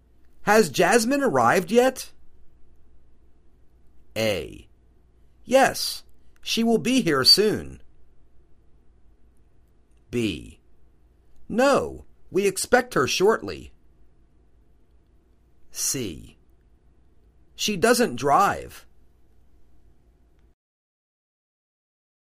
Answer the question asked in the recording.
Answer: No, we expect her shortly.